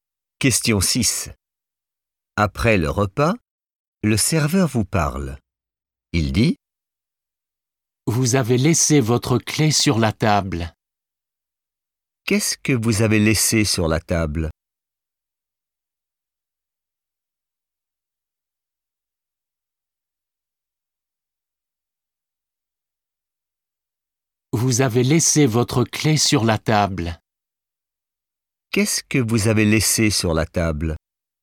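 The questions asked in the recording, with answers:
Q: Qu'est-ce que vous avez laissé sur la table?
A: votre clé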